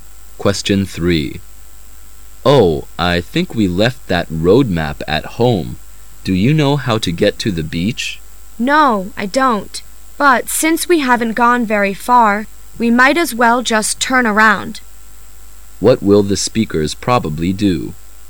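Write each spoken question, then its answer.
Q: What will the speakers probably do?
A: Go back home to get the map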